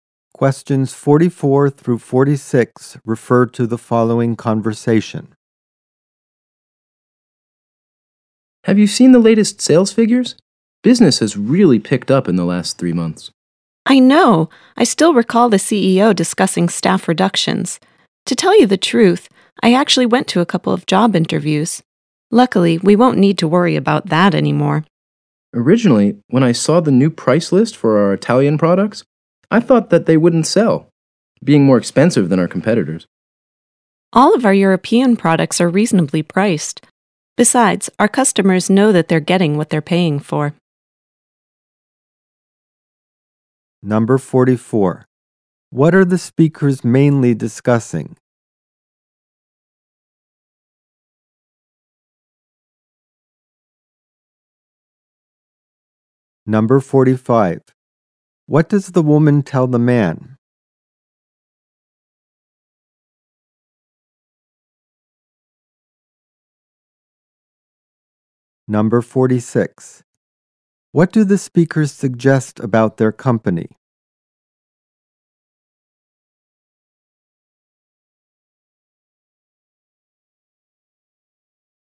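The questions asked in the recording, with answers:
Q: What are the speakers mainly discussing?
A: The company's improved sales figures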